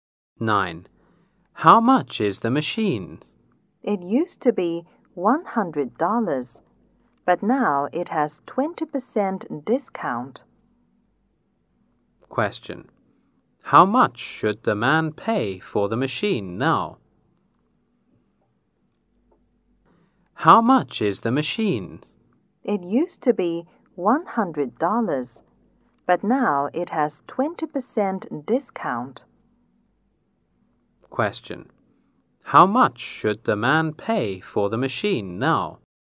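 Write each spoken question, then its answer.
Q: How much should the man pay for the machine now?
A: $80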